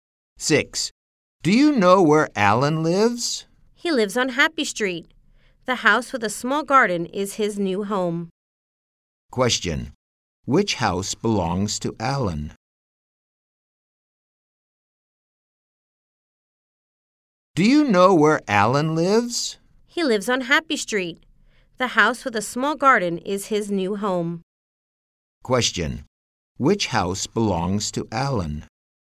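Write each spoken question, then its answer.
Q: Which house belongs to Alan?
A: The house with a small garden on Happy Street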